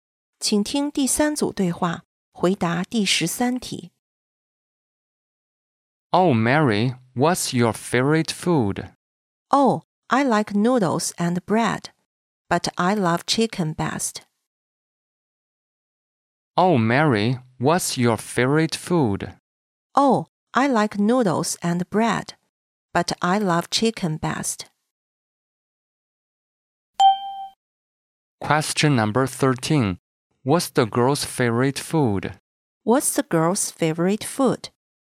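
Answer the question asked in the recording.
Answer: Chicken.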